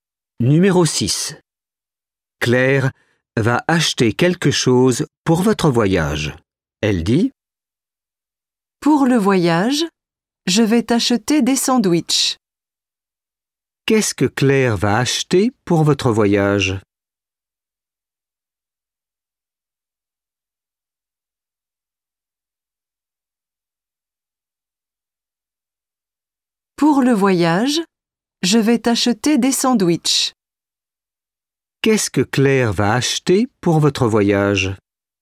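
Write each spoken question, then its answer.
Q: Qu'est-ce que Claire va acheter pour votre voyage?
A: Des sandwichs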